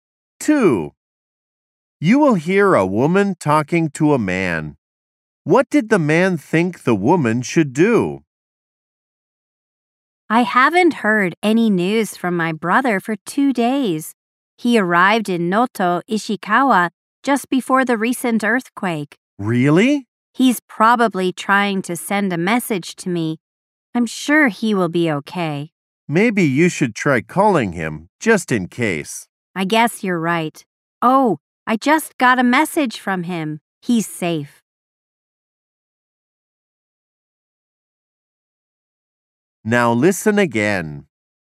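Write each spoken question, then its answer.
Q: What did the man think the woman should do?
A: Try calling her brother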